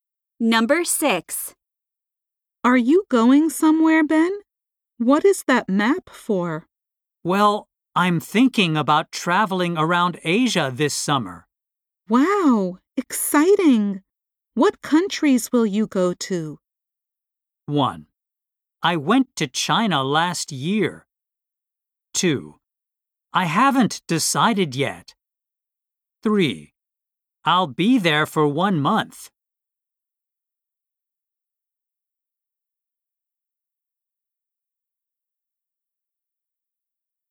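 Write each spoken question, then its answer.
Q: Wow, exciting! What countries will you go to?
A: 2: I haven't decided yet.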